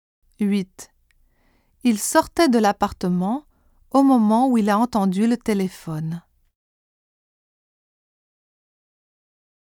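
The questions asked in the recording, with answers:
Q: Il sortait de l'appartement au moment où il a entendu le téléphone.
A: où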